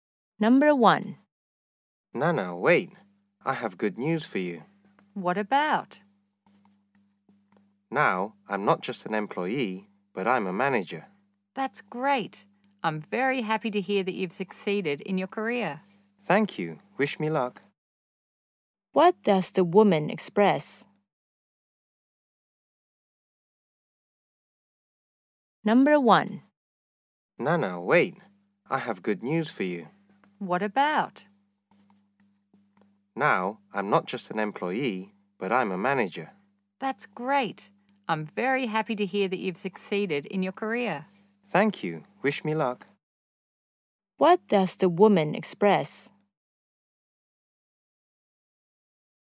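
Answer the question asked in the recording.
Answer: Congratulations / happiness at the man's promotion to manager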